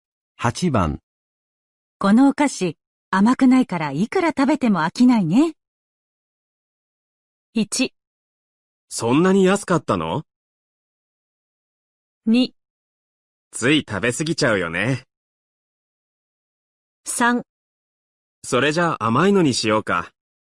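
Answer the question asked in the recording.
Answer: 2: つい食べ過ぎちゃうよね。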